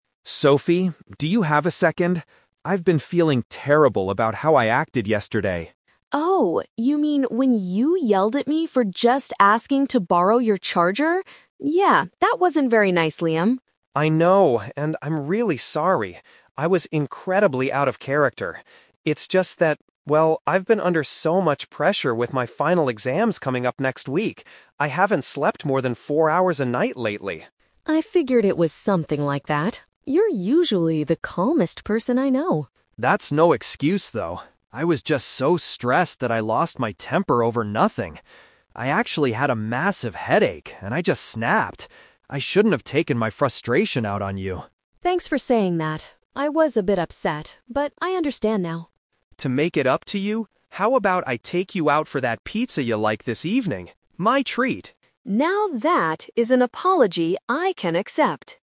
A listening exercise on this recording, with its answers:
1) Why did Liam shout at Sophie yesterday?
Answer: He was frustrated due to his studies.

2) How does Sophie describe Liam's USUAL personality?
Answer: He is generally a very composed person.

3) What is Liam going to do to apologize to his sister?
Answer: Buy her a meal later today.

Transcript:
Liam: Sophie, do you have a second? I've been feeling terrible about how I acted yesterday.
Sophie: Oh, you mean when you yelled at me for just asking to borrow your charger? Yeah, that wasn't very nice, Liam.
Liam: I know, and I'm really sorry. I was incredibly out of character. It's just that... well, I've been under so much pressure with my final exams coming up next week. I haven't slept more than four hours a night lately.
Sophie: I figured it was something like that. You're usually the calmest person I know.
Liam: That's no excuse, though. I was just so stressed that I lost my temper over nothing. I actually had a massive headache and I just snapped. I shouldn't have taken my frustration out on you.
Sophie: Thanks for saying that. I was a bit upset, but I understand now.
Liam: To make it up to you, how about I take you out for that pizza you like this evening? My treat.